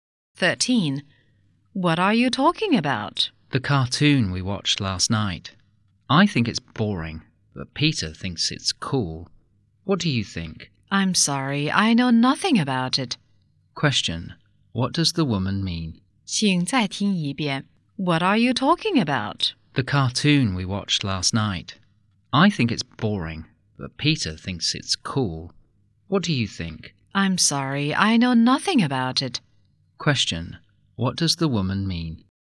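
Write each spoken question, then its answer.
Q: Question. What does the woman mean?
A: She knows nothing about the cartoon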